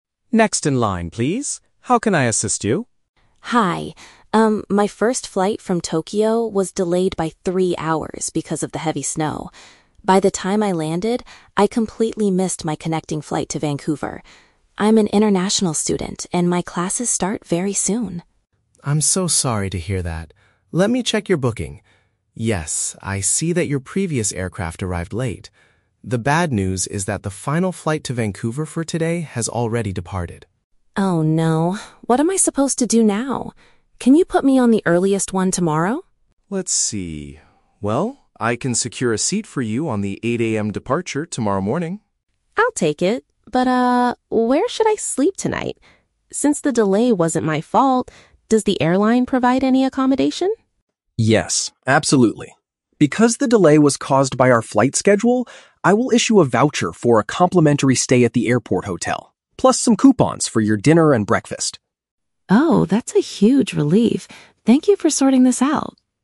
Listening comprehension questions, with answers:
Listen to the conversation between an international student and an airline ticket agent. Read the questions below and choose the correct answer (A, B, or C) for each.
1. Why did the student miss her second flight?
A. She got lost while looking for the correct boarding gate.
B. Severe weather conditions caused her previous plane to be late.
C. She overslept and forgot to check the departure screens.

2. What is the student's main problem at this exact moment?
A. The airline has accidentally lost all of her checked baggage.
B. She does not have enough money to buy a new ticket to Canada.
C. There are no more trips to her final destination available today.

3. How will the airline support the student during the delay?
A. They will provide a free room and food for the evening.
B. They will upgrade her to a first-class seat on the next journey.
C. They will give her cash to pay for a taxi to a nearby hostel.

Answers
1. B
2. C
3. A

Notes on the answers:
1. The Key (Correct): The student explains that her first flight was delayed "because of the heavy snow." (Paraphrased: heavy snow = severe weather conditions; delayed = late). The Trap: Option (A) is a very common reason for missing a connecting flight in a large airport, but getting lost is never mentioned. Option (C) is also a trap based on the word "late".

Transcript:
Agent: Next in line, please. How can I assist you?
Student: Hi. Um, my first flight from Tokyo was delayed by three hours because of the heavy snow. By the time I landed, I completely missed my connecting flight to Vancouver. I'm an international student and my classes start very soon!
Agent: I'm so sorry to hear that. Let me check your booking. Yes, I see that your previous aircraft arrived late. The bad news is that the final flight to Vancouver for today has already departed.
Student: Oh no... What am I supposed to do now? Can you put me on the earliest one tomorrow?
Agent: Let's see... Well, I can secure a seat for you on the 8:00 AM departure tomorrow morning.
Student: I'll take it. But, ah, where should I sleep tonight? Since the delay wasn't my fault, does the airline provide any accommodation?
Agent: Yes, absolutely. Because the delay was caused by our flight schedule, I will issue a voucher for a complimentary stay at the airport hotel, plus some coupons for your dinner and breakfast.

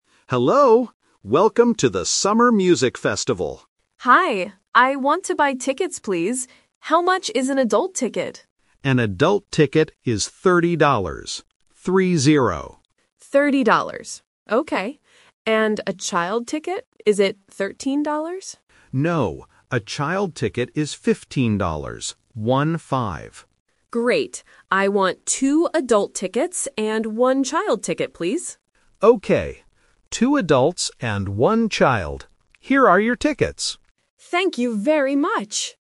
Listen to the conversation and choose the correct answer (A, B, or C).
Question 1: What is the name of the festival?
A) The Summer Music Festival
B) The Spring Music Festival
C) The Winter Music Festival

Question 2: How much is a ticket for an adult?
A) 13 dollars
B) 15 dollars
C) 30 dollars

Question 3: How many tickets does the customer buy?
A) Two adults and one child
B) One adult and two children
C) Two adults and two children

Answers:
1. A
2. C
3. A

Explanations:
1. The clerk says, "Welcome to the Summer Music Festival."
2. The clerk clearly says, "An adult ticket is 30 dollars" and says "Three-zero" to make it clear.
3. The customer says, "I want two adult tickets and one child ticket, please." The clerk also repeats this information.

